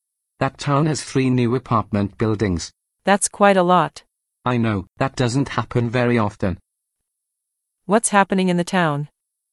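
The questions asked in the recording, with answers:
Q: What's happening in the town?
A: three new apartment buildings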